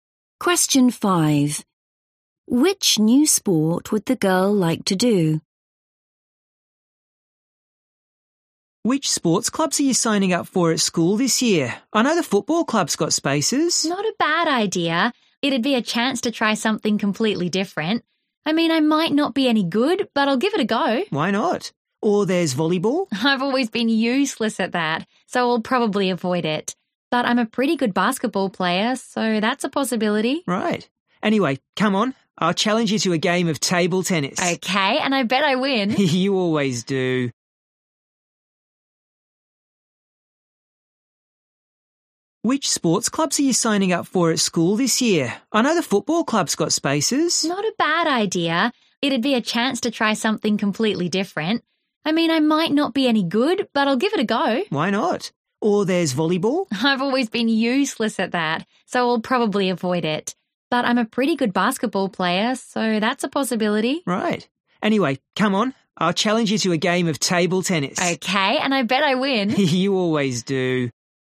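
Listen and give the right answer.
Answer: football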